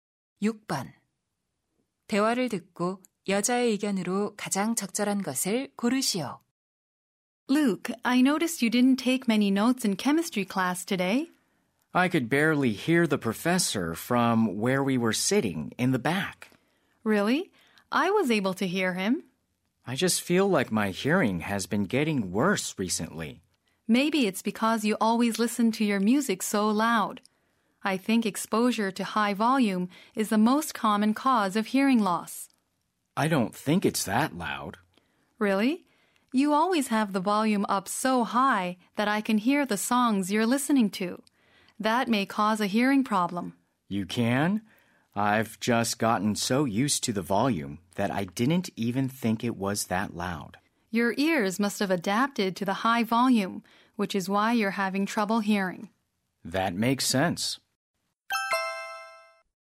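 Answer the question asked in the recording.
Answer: 큰 소리로 음악을 들으면 청력이 손상될 수 있다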